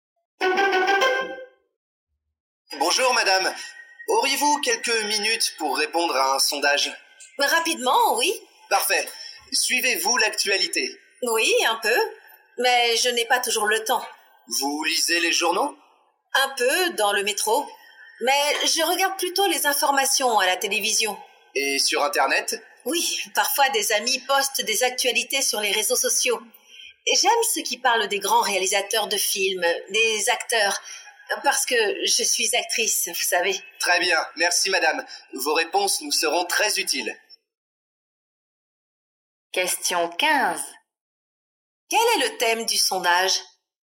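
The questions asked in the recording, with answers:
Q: Quel est le thème du sondage?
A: La façon de suivre l'actualité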